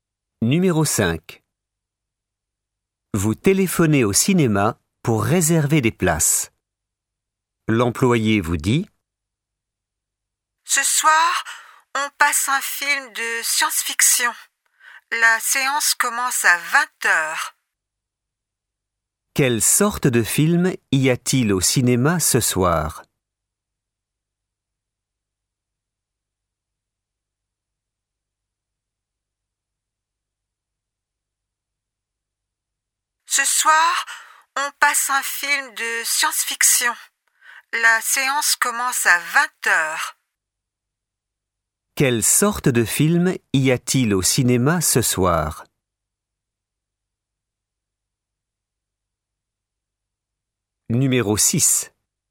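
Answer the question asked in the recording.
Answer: Un film de science-fiction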